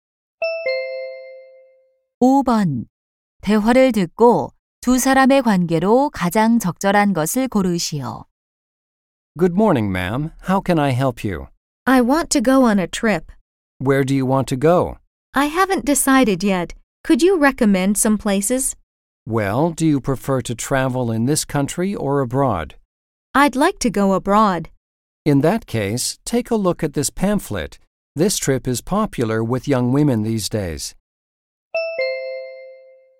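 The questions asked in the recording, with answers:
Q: 대화를 듣고 두 사람의 관계로 가장 적절한 것을 고르시오.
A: 여행사 직원과 고객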